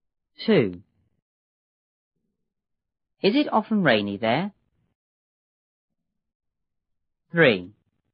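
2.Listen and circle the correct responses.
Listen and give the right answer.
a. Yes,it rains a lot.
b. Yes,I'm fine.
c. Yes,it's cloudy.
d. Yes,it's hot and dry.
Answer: a. Yes,it rains a lot.

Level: 六年级下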